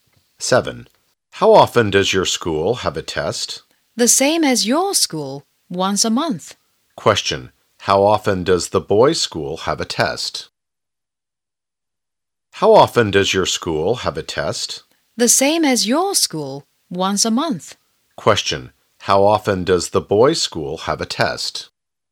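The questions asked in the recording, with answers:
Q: How often does the boys' school have a test?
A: Once a month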